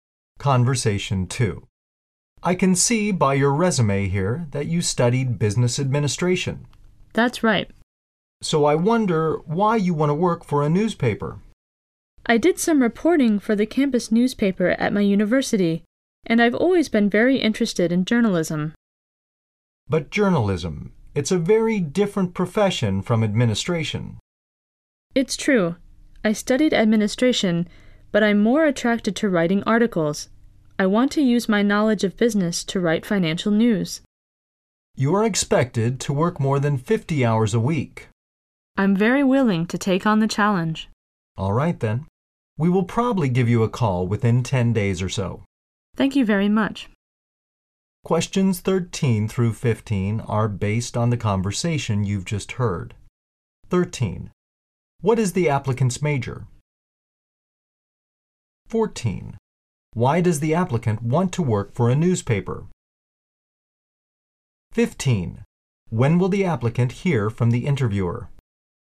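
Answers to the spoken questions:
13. Business administration
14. He has always been interested in journalism and wants to write financial news
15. Within about 10 days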